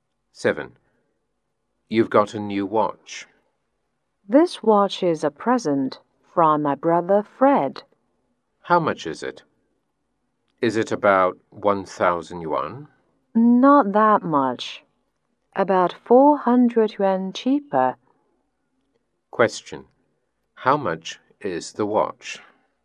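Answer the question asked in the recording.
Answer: About 600 yuan.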